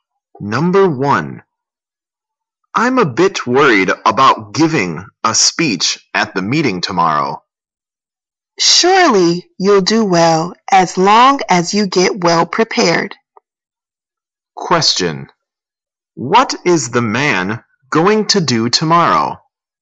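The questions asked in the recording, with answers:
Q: What is the man going to do tomorrow?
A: Give a speech at the meeting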